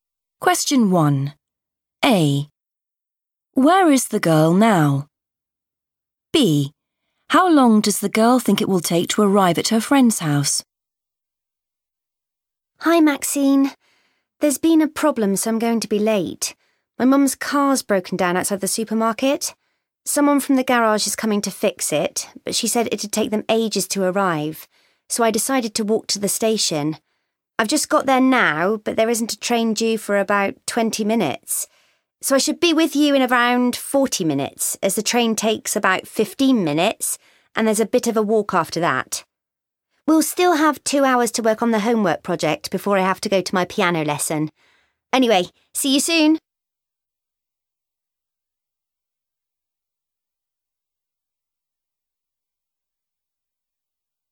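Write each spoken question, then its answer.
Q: Where is the girl now?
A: at the station

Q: How long does the girl think it will take to arrive at her friend's house?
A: around 40 minutes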